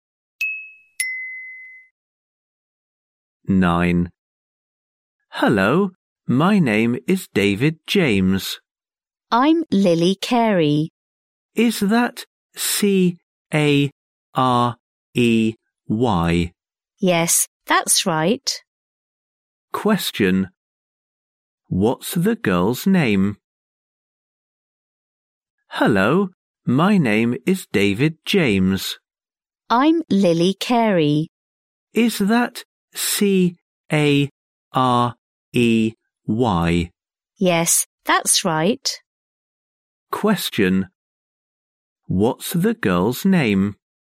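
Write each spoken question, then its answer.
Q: What's the girl's name?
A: Lily Carey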